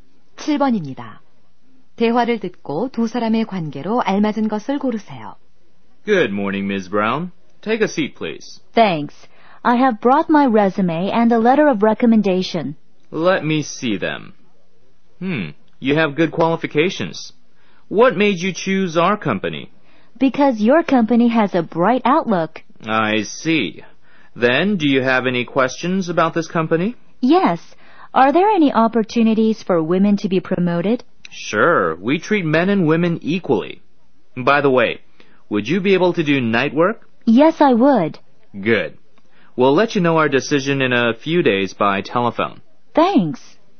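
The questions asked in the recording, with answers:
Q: 대화를 듣고 두 사람의 관계로 알맞은 것을 고르세요.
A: 면접관과 구직자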